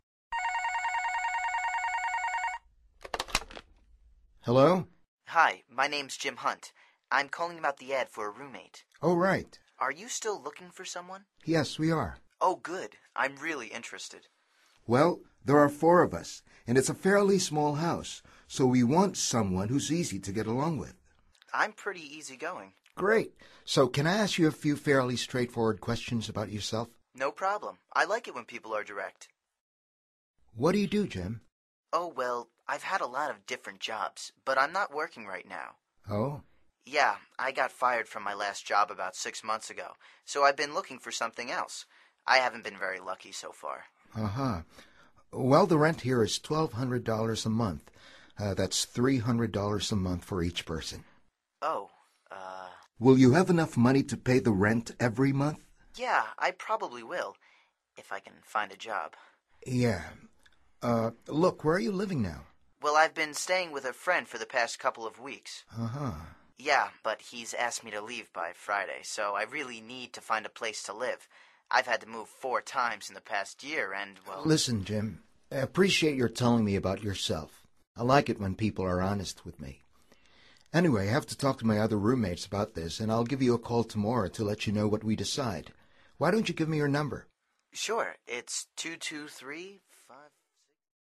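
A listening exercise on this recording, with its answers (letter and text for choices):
Activity 34: Basándote en los comentarios anteriores, selecciona las opciones más adecuadas para cada oración. Verifica luego las respuestas correctas.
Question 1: How many people live in the house?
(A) Three people.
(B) Four people.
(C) Five people.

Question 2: What's their house like?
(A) It's easy to get along with.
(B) It's interesting.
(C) It's fairly small.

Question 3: How does Jim describe his personality?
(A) He says he's pretty easygoing.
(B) He says he's straightforward.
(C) He says he's direct.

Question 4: How much is their monthly rent?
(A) Twelve thousand.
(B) One thousand two hundred.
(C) Three hundred.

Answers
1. (B) Four people.
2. (C) It's fairly small.
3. (A) He says he's pretty easygoing.
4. (B) One thousand two hundred.

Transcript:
Hello?
Jim:
Hi. My name's Jim Hant. I'm calling about the ad for a roommate.
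Oh, right.
Jim:
Are you still looking for someone?
Yes, we are.
Jim:
Oh, good. I'm really interested.
Well, there are four of us, and it's a fairly small house, so we want someone who's easy to get along with.
Jim:
I'm pretty easygoing.
Great! So can I ask you a few fairly straightforward questions about yourself?
Jim:
No problem. I like it when people are direct.
What do you do, Jim?
Jim:
Oh, well, I've had a lot of different jobs, but I'm not working right now.
Oh?
Jim:
Yeah, I got fired from my last job about six months ago, so I've been looking for something else. I haven't been very lucky so far.
Uh-huh. Well, the rent here is $1,200 a month – uh, that's $300 a month for each person.
Jim:
Oh. Uh....
Will you have enough money to pay the rent every month?
Jim:
Yeah, I probably will... if I can find a job.
Yeah. Uh, look, where are you living now?
Jim:
Well, I've been staying with a friend for the past couple of weeks.
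Uh-huh.
Jim:
Yeah, but he's asked me to leave by Friday, so I really need to find a place to live. I've had to move four times in the past year and, well....
Listen, Jim, I appreciate your telling me about yourself. Anyway, I have to talk to my other roommates about this, and I'll give you a call tomorrow to let you know what we decide. Why don't you give me your number?
Jim:

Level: Nivel Avanzado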